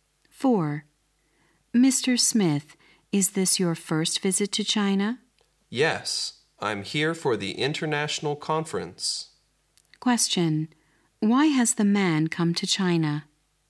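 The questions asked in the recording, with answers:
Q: Why has the man come to China?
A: To attend an international conference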